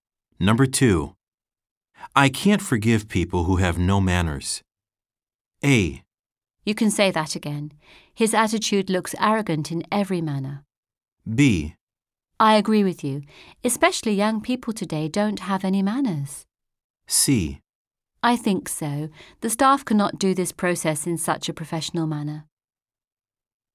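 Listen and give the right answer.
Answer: B: I agree with you. Especially young people today don't have any manners.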